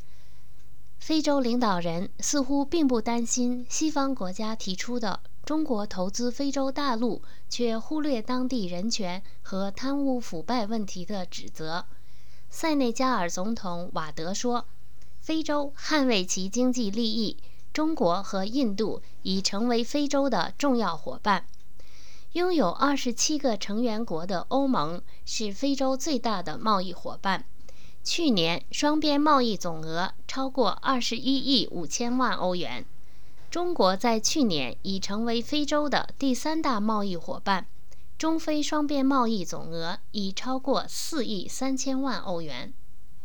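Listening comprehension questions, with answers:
Please answer the following questions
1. Which two countries were called Africa's important economic partners by African leaders?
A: China and India

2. What was the total amount of bilateral trade in terms of Euros between China and Africa last year?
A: Over 430 million euros

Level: M.Phil Year 2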